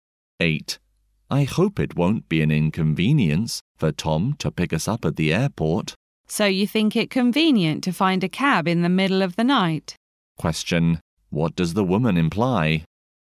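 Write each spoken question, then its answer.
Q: What does the woman imply?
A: They need Tom to pick them up because finding a cab at night is hard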